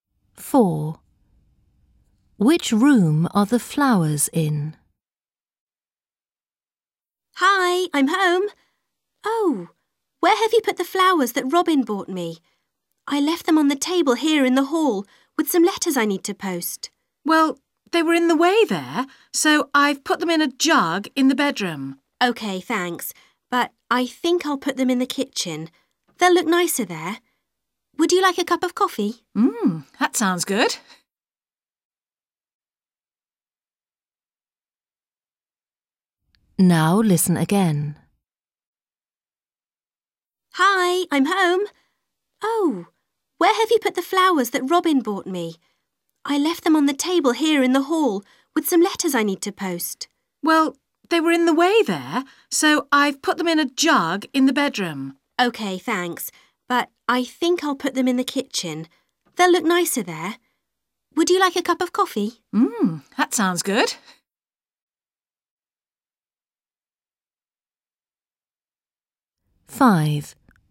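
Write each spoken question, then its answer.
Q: Which room are the flowers in?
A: the bedroom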